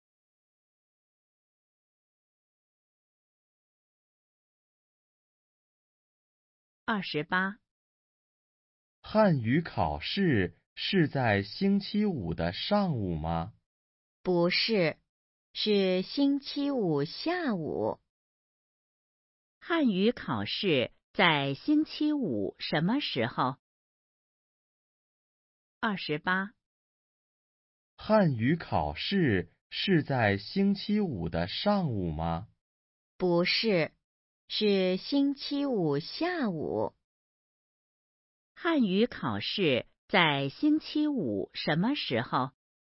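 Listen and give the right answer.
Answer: 下午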